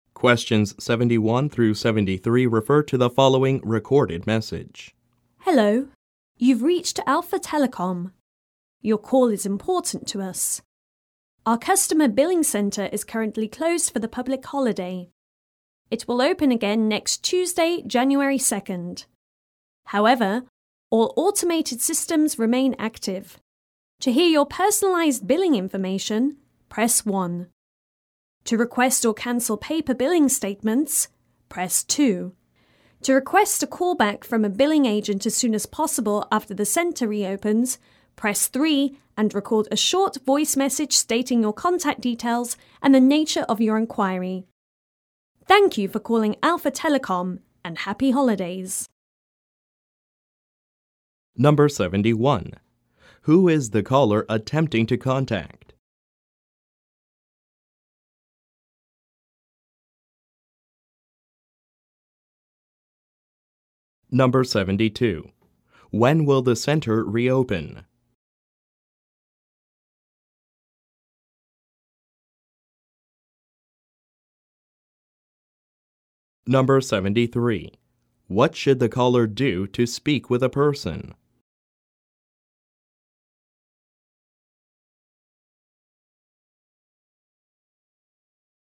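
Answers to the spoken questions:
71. Alpha Telecom's customer billing center
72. Next Tuesday, January 2nd
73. Press 3 and leave a voice message with contact details to request a callback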